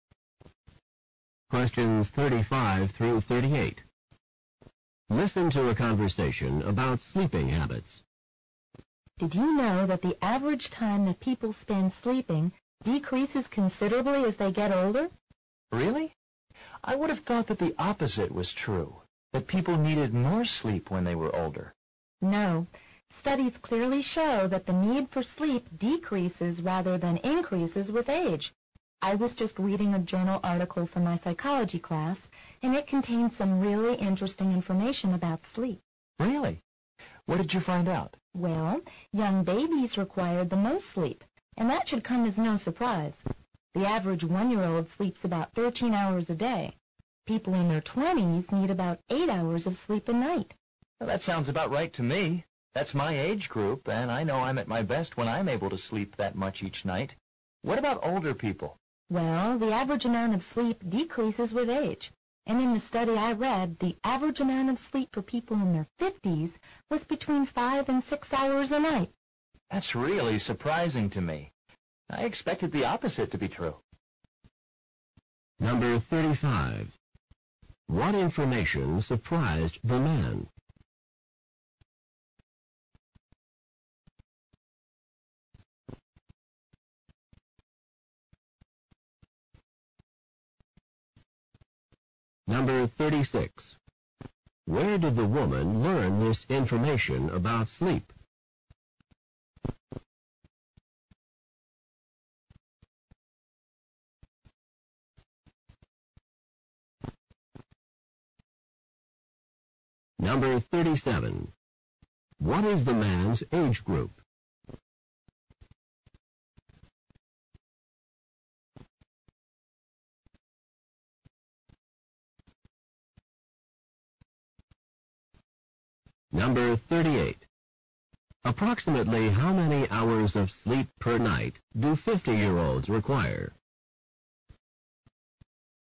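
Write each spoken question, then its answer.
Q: What information surprised the man?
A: That people need less sleep as they get older

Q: Where did the woman learn this information about sleep?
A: In a journal article for her psychology class

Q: What is the man's age group?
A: His twenties

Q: Approximately how many hours of sleep per night do 50-year-olds require?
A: Between 5 and 6 hours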